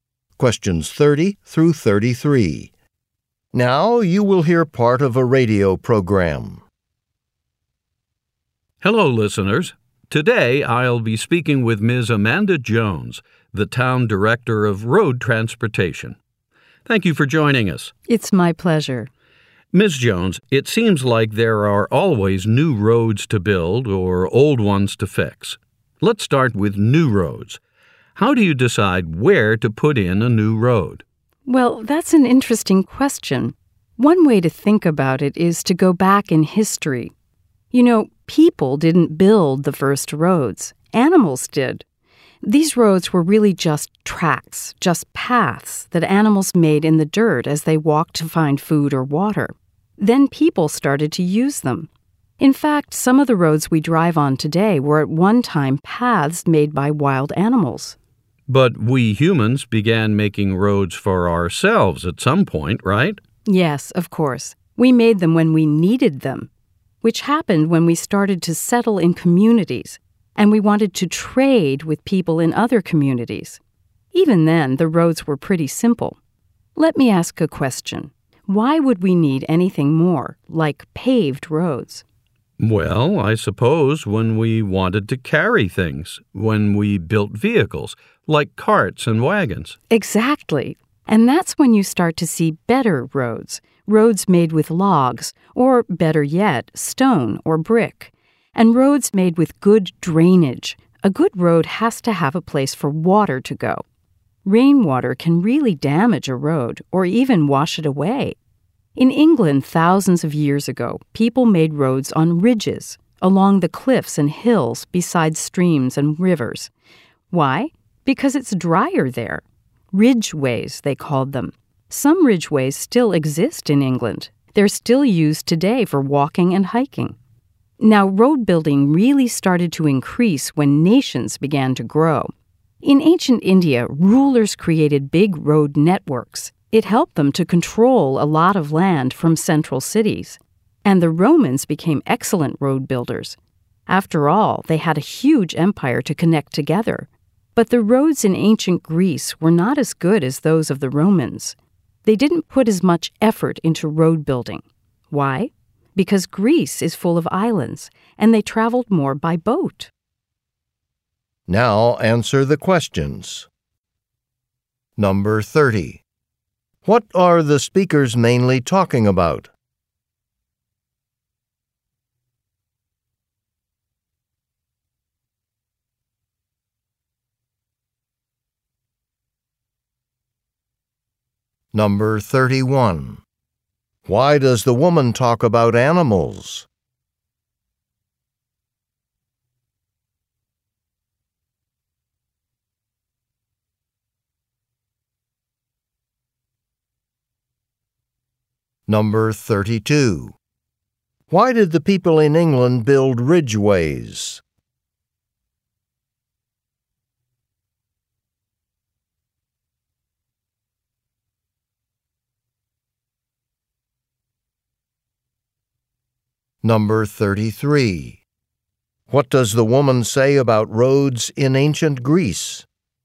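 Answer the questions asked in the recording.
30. The history of road building
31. Animals made the first roads (paths), which people later used
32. Because it is drier there, away from water that damages roads
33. They were not as good as Roman roads because Greeks traveled more by boat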